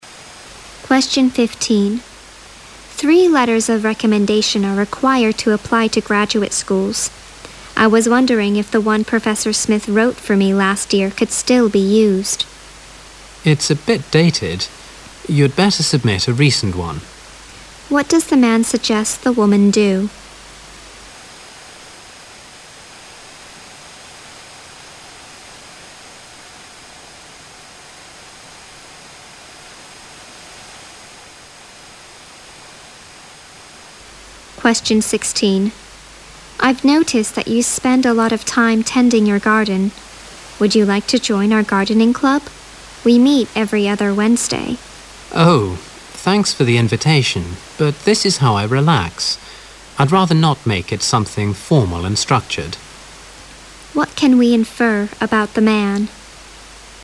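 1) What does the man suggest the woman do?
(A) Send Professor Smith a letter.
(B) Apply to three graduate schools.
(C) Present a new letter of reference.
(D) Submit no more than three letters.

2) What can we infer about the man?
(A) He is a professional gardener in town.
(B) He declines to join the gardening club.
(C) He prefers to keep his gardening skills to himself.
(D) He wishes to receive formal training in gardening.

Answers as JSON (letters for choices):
{"1": "C", "2": "B"}

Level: 六级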